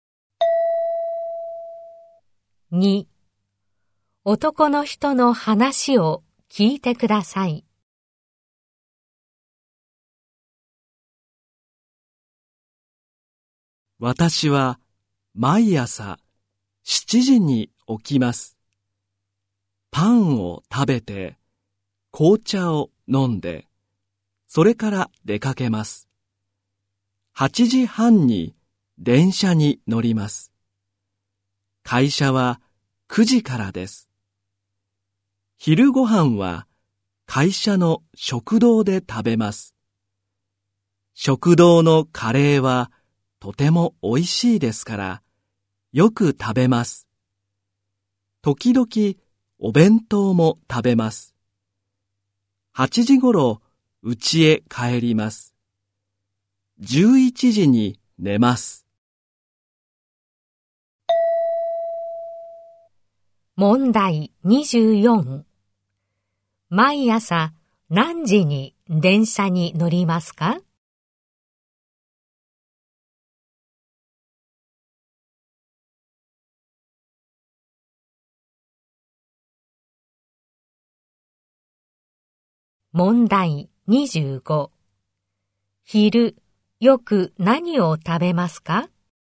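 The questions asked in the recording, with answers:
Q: 毎朝何時に電車に乗りますか?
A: 8時半

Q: 昼よく何を食べますか?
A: カレー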